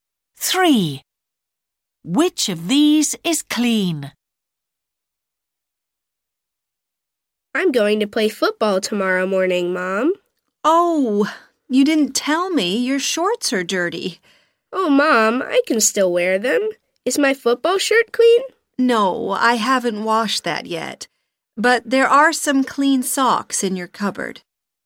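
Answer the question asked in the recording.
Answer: socks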